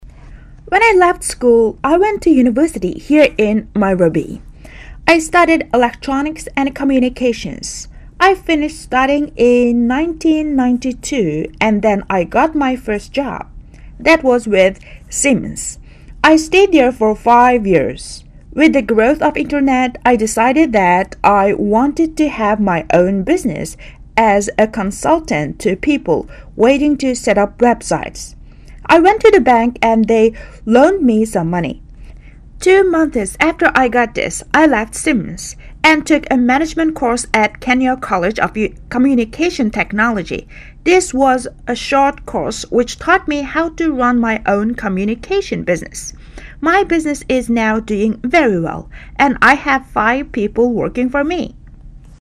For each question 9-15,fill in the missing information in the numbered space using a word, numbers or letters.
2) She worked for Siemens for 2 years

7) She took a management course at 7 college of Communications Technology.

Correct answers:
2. five
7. Kenya

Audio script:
[解析] 9-15 When I left school I went to university here in Nairobi. I studied electronics end communications. I finished studying in 1992 and then I got my first job. That was with Siemens. I stayed there for five years. With the growth of the Internet, I decided that I wanted to have my own business as a consultant to people wanting to set up websites. I went to the bank and they loaned me some motley. Two months after I got this, I left Siemens and took a management course at Kenya College of Communications Technology. This was a short course which taught me how to run my own communications business. My business is now doing very well, and I have five people working for me.
2.